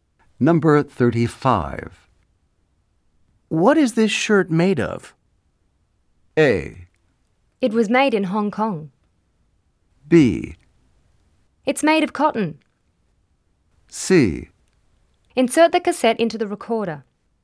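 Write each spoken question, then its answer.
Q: What is this shirt made of?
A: B: It's made of cotton.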